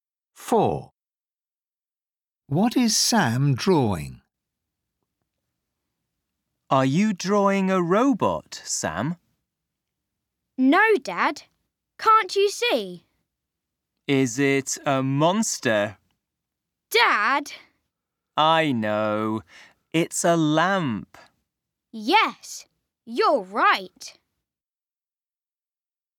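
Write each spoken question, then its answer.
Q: What is Sam drawing?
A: A lamp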